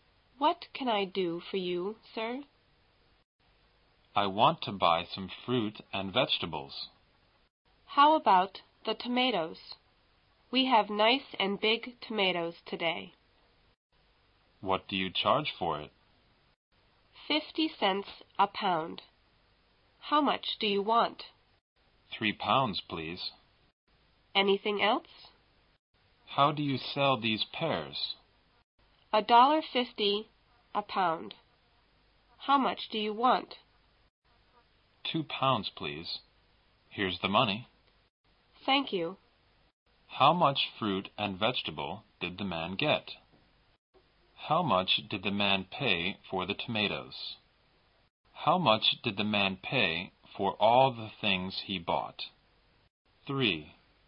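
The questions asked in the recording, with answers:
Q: How much fruit and vegetable did the man get?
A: 3 pounds of tomatoes and 2 pounds of pears

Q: How much did the man pay for the tomatoes?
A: $1.50

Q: How much did the man pay for all the things he bought?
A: $4.50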